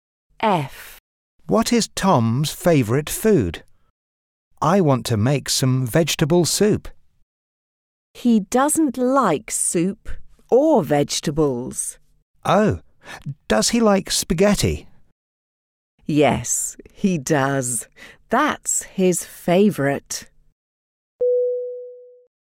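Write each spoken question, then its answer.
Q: What is Tom's favourite food?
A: Spaghetti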